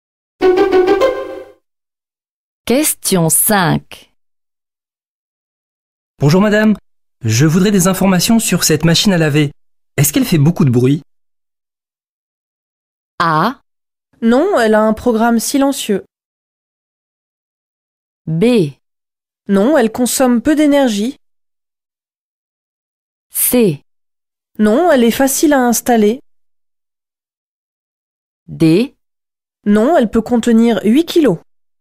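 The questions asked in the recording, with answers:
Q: Est-ce qu'elle fait beaucoup de bruit?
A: A: Non, elle a un programme silencieux.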